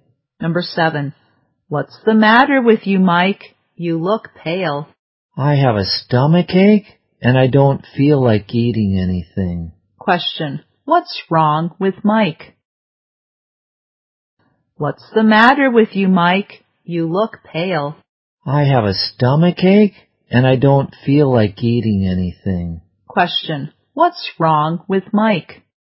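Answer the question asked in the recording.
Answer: He has a stomach ache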